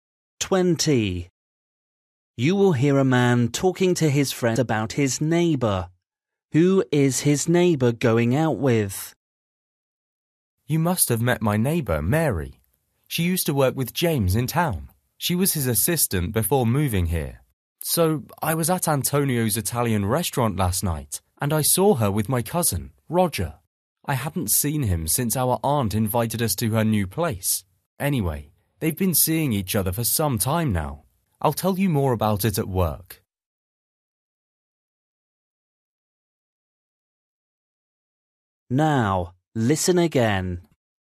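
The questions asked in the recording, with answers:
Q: Who is his neighbour going out with?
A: His cousin Roger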